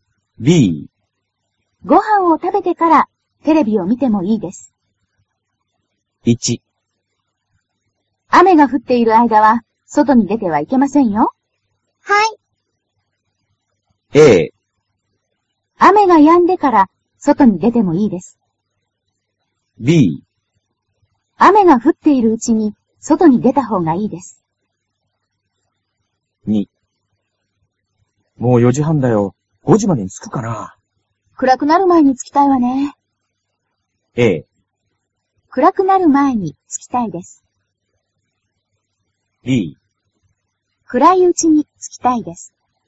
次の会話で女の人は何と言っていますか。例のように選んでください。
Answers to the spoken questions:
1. a
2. a

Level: cơ bản